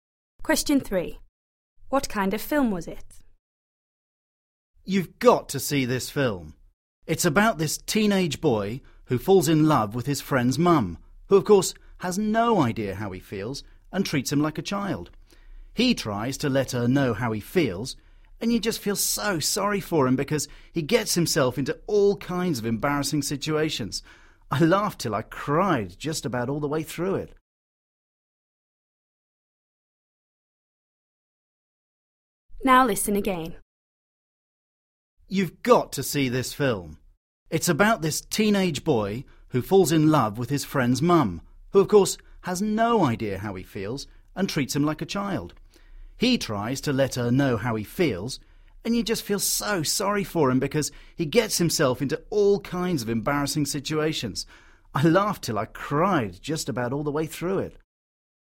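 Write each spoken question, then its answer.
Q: What kind of film was it?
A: A comedy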